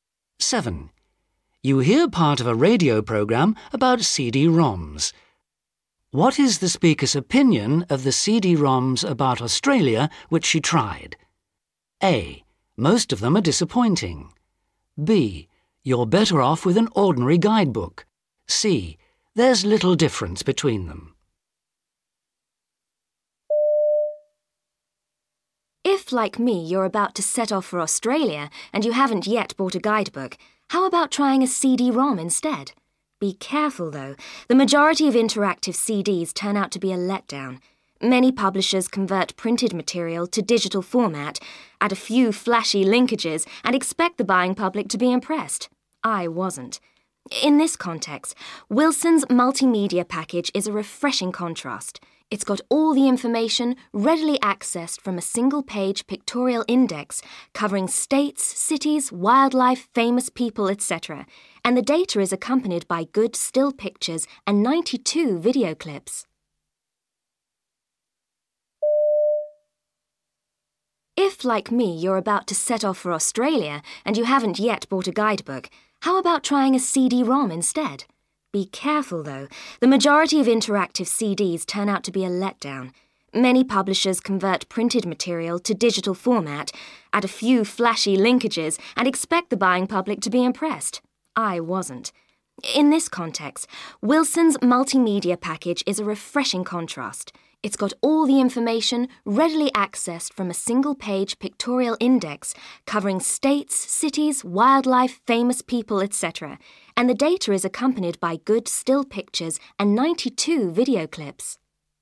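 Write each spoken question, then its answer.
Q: What is the speaker's opinion of the CD-ROMs about Australia which she tried?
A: A: Most of them are disappointing.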